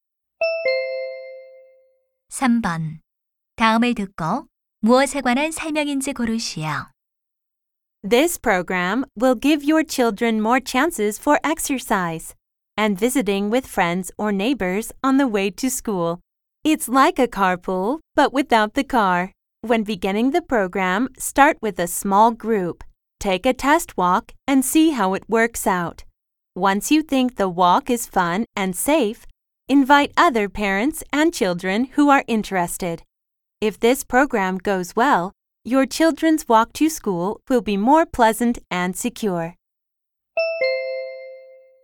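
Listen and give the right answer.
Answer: 아이들이 무리 지어 함께 걸어서 등교하는 프로그램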